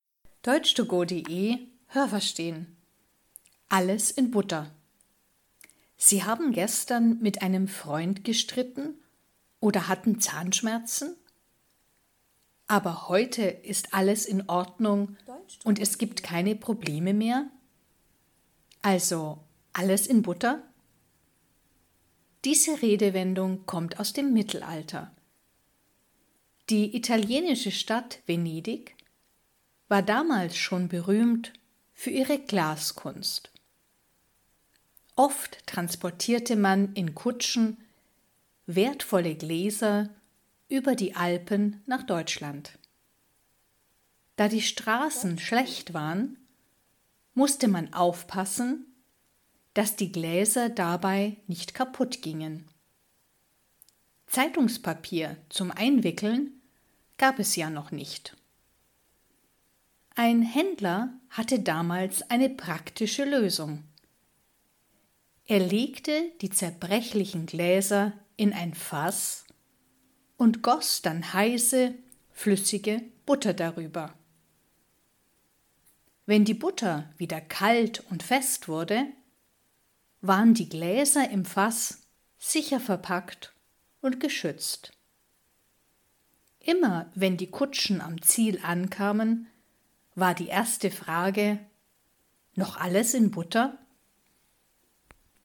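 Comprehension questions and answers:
Haben Sie das gehört? Stimmt diese Aussage?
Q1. „Alles in Butter" bedeutet: Es gibt Probleme.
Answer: Falsch

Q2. Die italienische Stadt Venedig war schon im Mittelalter berühmt für ihre Glaskunst.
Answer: Richtig

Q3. Damals transportierte man schon Gläser von Italien nach Deutschland.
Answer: Richtig

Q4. Man fuhr damals mit Kutschen über die Alpen.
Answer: Richtig

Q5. Damit die Gläser nicht kaputtgingen, wickelte man sie in Zeitungspapier ein.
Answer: Falsch

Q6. Man legte die Gläser in Fässer und goss heiße Butter darüber.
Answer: Richtig

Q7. Die Gläser schwammen in der flüssigen Butter und waren so sicher verpackt.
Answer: Falsch

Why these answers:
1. Es bedeutet: Es gibt keine Probleme, alles ist in Ordnung.
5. Damals gab es noch kein Zeitungspapier.
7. Die flüssige Butter musste zuerst kalt und fest werden. Erst dann waren die Gläser in der Butter sicher.

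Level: Hörtexte A (einfach)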